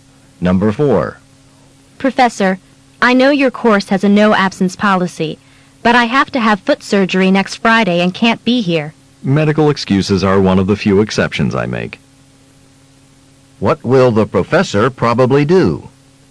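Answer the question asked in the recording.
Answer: Excuse the student's absence for surgery.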